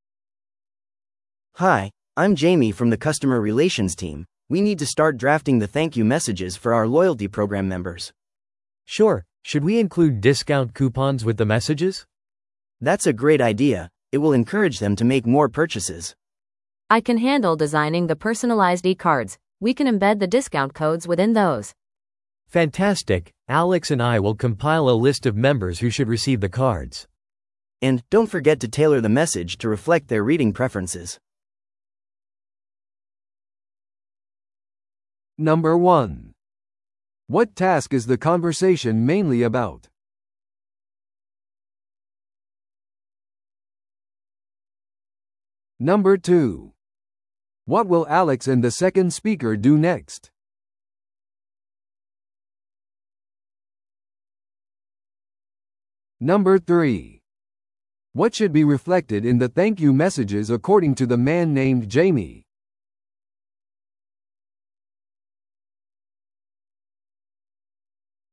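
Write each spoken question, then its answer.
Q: What task is the conversation mainly about?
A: Drafting thank-you messages for loyalty program members

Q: What will Alex and the second speaker do next?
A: Compile a list of members who should receive the cards

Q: What should be reflected in the thank you messages according to the man named Jamie?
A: The members' reading preferences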